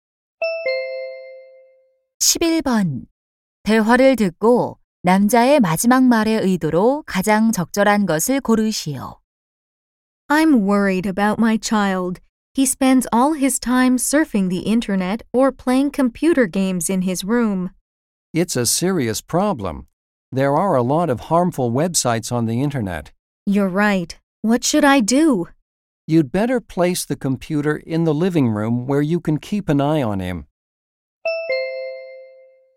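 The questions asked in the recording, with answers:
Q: 대화를 듣고 남자의 마지막 말의 의도로 가장 적절한 것을 고르시오.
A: 충고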